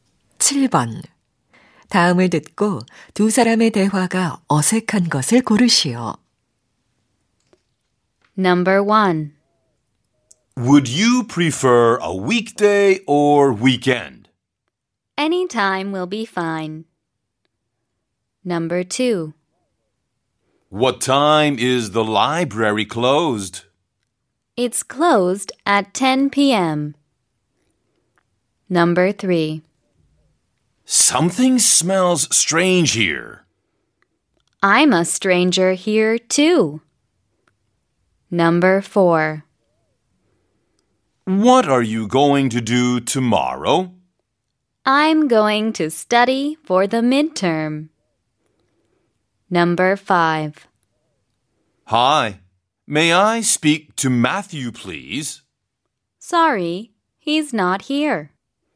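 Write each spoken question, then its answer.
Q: 다음을 듣고 두 사람의 대화가 어색한 것을 고르시오.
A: 3: Something smells strange here. / I'm a stranger here, too.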